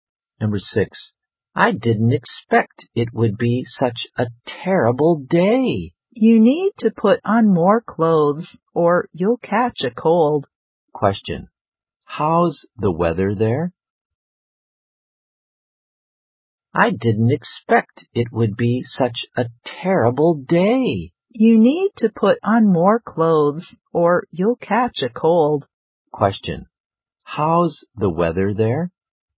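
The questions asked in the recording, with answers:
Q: how's the weather there?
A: It's cold and terrible.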